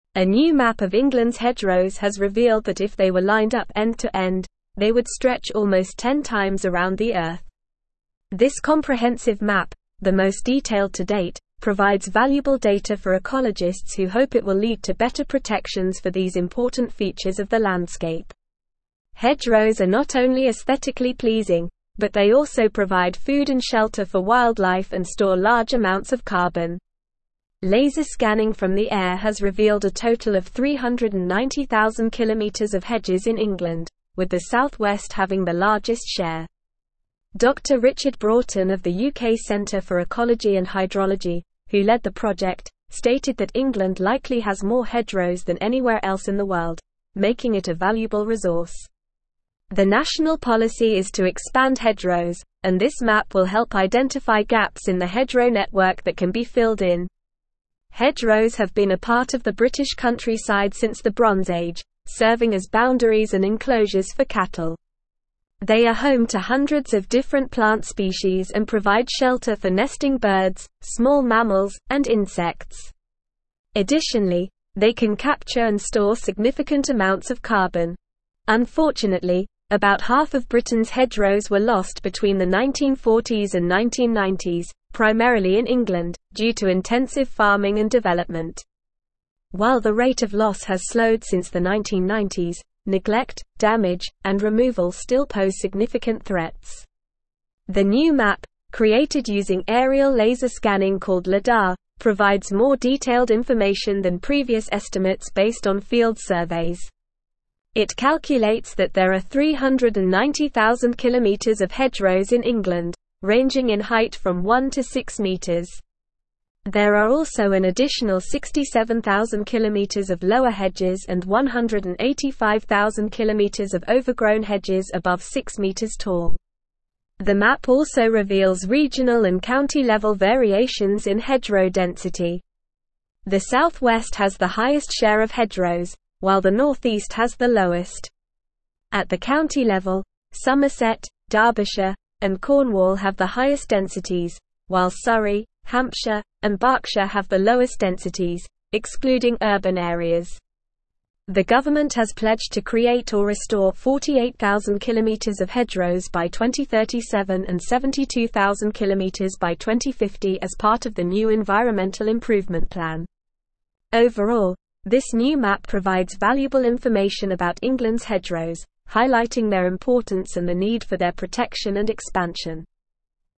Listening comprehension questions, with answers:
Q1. This comprehensive map, the most detailed to date, (1)______s valuable data for ecologists who hope it will lead to better protections for these important features of the landscape.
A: provide

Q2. Laser scanning from the air has revealed a total of 390,000 km of (2)______ in England, with the (3)______ West having the largest share.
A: hedges

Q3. Laser scanning from the air has revealed a total of 390,000 km of (2)______ in England, with the (3)______ West having the largest share.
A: South

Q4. Dr. Richard Broughton of the UK (4)______ for Ecology and Hydrology, who led the project, stated that (5)______ likely has more hedgerows than anywhere else in the (6)______, making it a valuable (7)______.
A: Centre

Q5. Dr. Richard Broughton of the UK (4)______ for Ecology and Hydrology, who led the project, stated that (5)______ likely has more hedgerows than anywhere else in the (6)______, making it a valuable (7)______.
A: England

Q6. Dr. Richard Broughton of the UK (4)______ for Ecology and Hydrology, who led the project, stated that (5)______ likely has more hedgerows than anywhere else in the (6)______, making it a valuable (7)______.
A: world

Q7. Dr. Richard Broughton of the UK (4)______ for Ecology and Hydrology, who led the project, stated that (5)______ likely has more hedgerows than anywhere else in the (6)______, making it a valuable (7)______.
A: resource

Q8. The national (8)______ is to expand hedgerows, and this map will help identify gaps in the hedgerow network that can be filled in.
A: policy

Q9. Unfortunately, about half of Britain's (9)______ were lost between the 1940s and 1990s, primarily in England, due to intensive farming and development.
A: hedgerows

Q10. The new map, created using aerial laser scanning called (10)______, (11)______ more detailed information than previous (12)______ based on field surveys.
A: Lidar

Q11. The new map, created using aerial laser scanning called (10)______, (11)______ more detailed information than previous (12)______ based on field surveys.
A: provides

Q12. The new map, created using aerial laser scanning called (10)______, (11)______ more detailed information than previous (12)______ based on field surveys.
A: estimates

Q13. The South West has the highest share of hedgerows, while the northeast has the (13)______.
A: lowest

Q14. The (14)______ has pledged to (15)______ or restore 48,000 km of hedgerows by 2037 and 72,000 km by 2050 as part of the new Environmental Improvement Plan.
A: government

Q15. The (14)______ has pledged to (15)______ or restore 48,000 km of hedgerows by 2037 and 72,000 km by 2050 as part of the new Environmental Improvement Plan.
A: create

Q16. Overall, this new map provides (16)______ information about England's hedgerows, highlighting their importance and the need for their protection and expansion.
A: valuable

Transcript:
A new map of England's hedgerows has revealed that if they were lined up end to end, they would stretch almost ten times around the Earth. This comprehensive map, the most detailed to date, provides valuable data for ecologists who hope it will lead to better protections for these important features of the landscape. Hedgerows are not only aesthetically pleasing, but they also provide food and shelter for wildlife and store large amounts of carbon. Laser scanning from the air has revealed a total of 390,000 km of hedges in England, with the South West having the largest share.
Dr. Richard Broughton of the UK Centre for Ecology and Hydrology, who led the project, stated that England likely has more hedgerows than anywhere else in the world, making it a valuable resource. The national policy is to expand hedgerows, and this map will help identify gaps in the hedgerow network that can be filled in. Hedgerows have been a part of the British countryside since the Bronze Age, serving as boundaries and enclosures for cattle. They are home to hundreds of different plant species and provide shelter for nesting birds, small mammals, and insects. Additionally, they can capture and store significant amounts of carbon.
Unfortunately, about half of Britain's hedgerows were lost between the 1940s and 1990s, primarily in England, due to intensive farming and development. While the rate of loss has slowed since the 1990s, neglect, damage, and removal still pose significant threats. The new map, created using aerial laser scanning called Lidar, provides more detailed information than previous estimates based on field surveys. It calculates that there are 390,000 km of hedgerows in England, ranging in height from 1 to 6 meters. There are also an additional 67,000 km of lower hedges and 185,000 km of overgrown hedges above 6 meters tall.
The map also reveals regional and county-level variations in hedgerow density. The South West has the highest share of hedgerows, while the northeast has the lowest. At the county level, Somerset, Derbyshire, and Cornwall have the highest densities, while Surrey, Hampshire, and Berkshire have the lowest densities, excluding urban areas. The government has pledged to create or restore 48,000 km of hedgerows by 2037 and 72,000 km by 2050 as part of the new Environmental Improvement Plan.
Overall, this new map provides valuable information about England's hedgerows, highlighting their importance and the need for their protection and expansion.

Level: Level 4